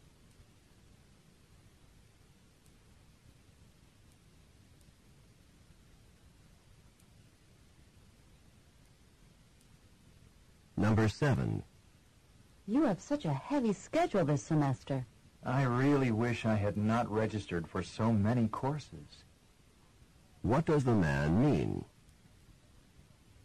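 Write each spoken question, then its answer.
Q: What does the man mean?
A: He registered for too many courses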